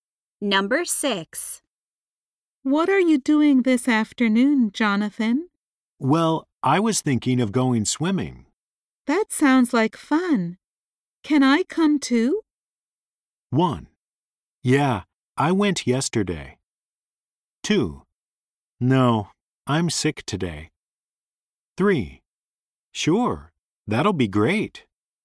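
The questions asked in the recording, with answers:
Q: That sounds like fun. Can I come too?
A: 3: Sure, that'll be great.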